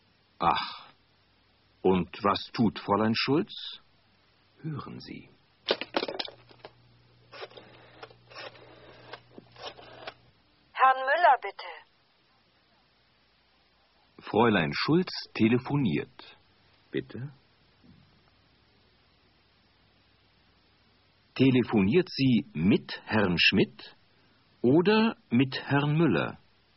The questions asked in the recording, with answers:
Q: Telefoniert sie mit Herrn Schmidt oder mit Herrn Müller?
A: Sie telefoniert mit Herrn Müller.